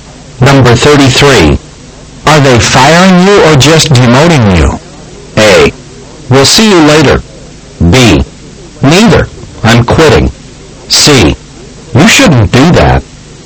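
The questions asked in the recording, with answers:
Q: Are they firing you or just demoting you?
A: B: Neither. I'm quitting.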